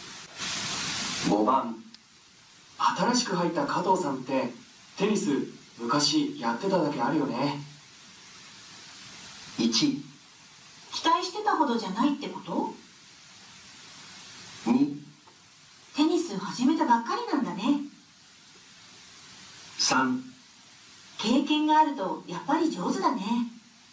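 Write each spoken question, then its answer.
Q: 新しく入った加藤さんってテニス昔やってただけあるよね。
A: 3: 経験があるとやっぱり上手だね。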